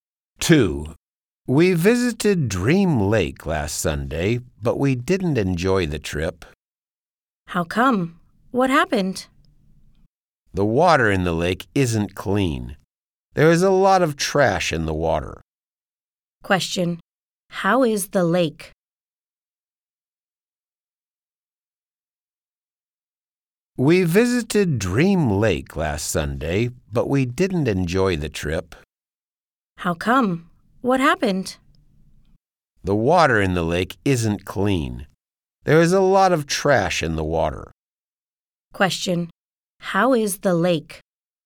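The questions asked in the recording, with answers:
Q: How is the lake?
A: It is dirty; there is a lot of trash in the water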